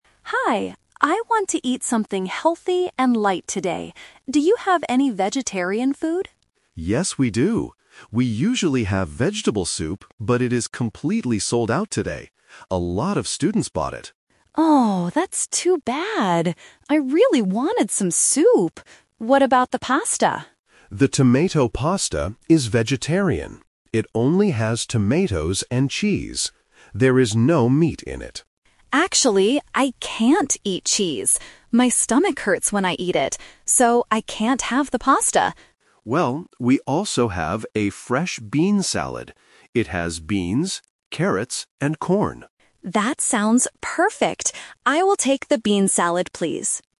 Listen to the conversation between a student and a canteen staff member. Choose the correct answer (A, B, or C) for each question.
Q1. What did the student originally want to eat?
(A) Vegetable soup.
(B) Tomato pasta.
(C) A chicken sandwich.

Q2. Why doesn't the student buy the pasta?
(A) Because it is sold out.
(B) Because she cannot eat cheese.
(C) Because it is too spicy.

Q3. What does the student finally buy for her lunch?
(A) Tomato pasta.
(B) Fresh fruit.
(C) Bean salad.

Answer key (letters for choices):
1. A
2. B
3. C

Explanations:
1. The student says, "I really wanted some soup" after the staff says it is sold out. Option (B) is a trap; she asks about the pasta after she finds out the soup is gone. Option (C) is a plausible canteen food, but it is never mentioned.
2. The student clearly states, "I can't eat cheese. My stomach hurts when I eat it." Option (A) is a trap; the vegetable soup is sold out, not the pasta. Option (C) is a plausible reason to reject food, but it is not mentioned in the audio.
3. At the end of the conversation, the student decides, "I will take the bean salad, please." Option (A) is a trap; she considered the pasta but rejected it because of the cheese. Option (B) is a plausible healthy option but is not mentioned.

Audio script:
Student: Hi. I want to eat something healthy and light today. Do you have any vegetarian food?
Staff: Yes, we do. We usually have vegetable soup, but it is completely sold out today. A lot of students bought it.
Student: Oh, that's too bad. I really wanted some soup. What about the pasta?
Staff: The tomato pasta is vegetarian. It only has tomatoes and cheese. There is no meat in it.
Student: Actually, I can't eat cheese. My stomach hurts when I eat it. So I can't have the pasta.
Staff: Well, we also have a fresh bean salad. It has beans, carrots, and corn.